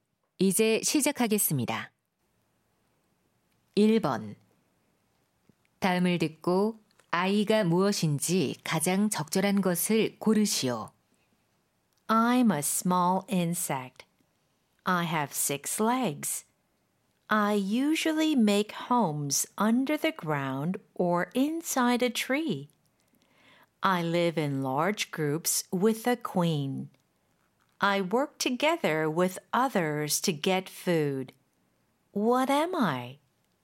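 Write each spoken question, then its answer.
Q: 다음을 듣고 아이가 무엇인지 가장 적절한 것을 고르시오.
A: 개미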